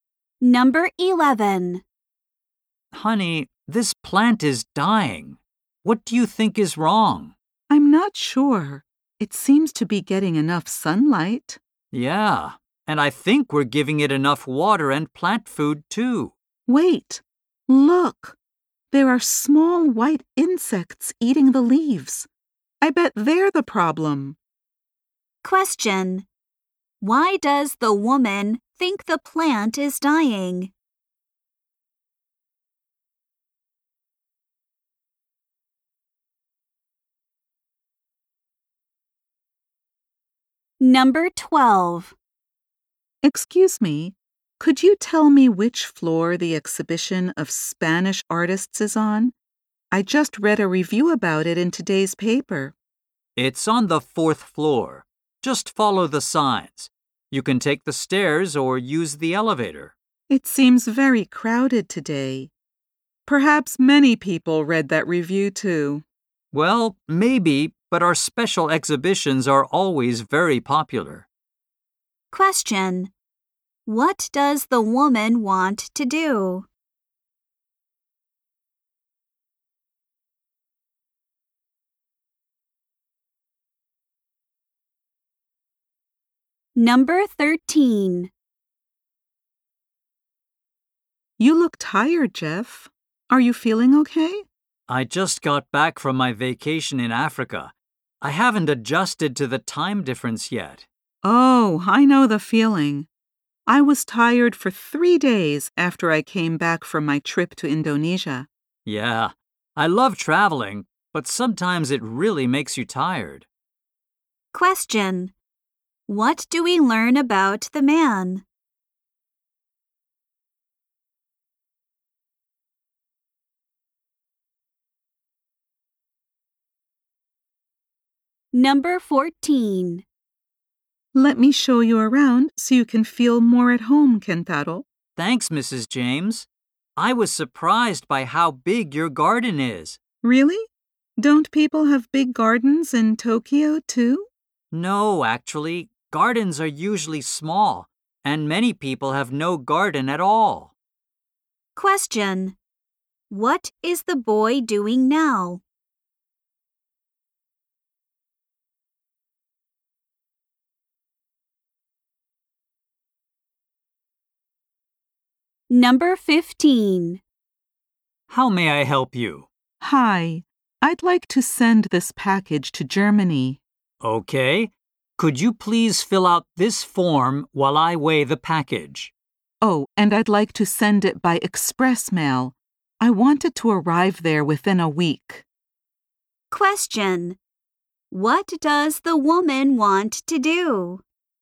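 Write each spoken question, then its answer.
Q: Why does the woman think the plant is dying?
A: Small insects are eating its leaves

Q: What does the woman want to do?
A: See the exhibition of Spanish artists

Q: What do we learn about the man?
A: He is tired from the time difference after his trip to Africa

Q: What does the woman want to do?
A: Send a package to Germany by express mail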